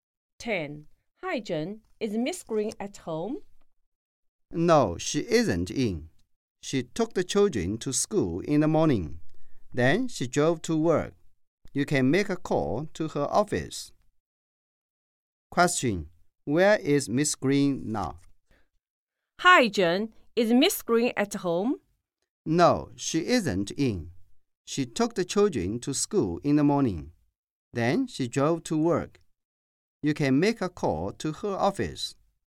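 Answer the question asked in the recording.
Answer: In her office, at work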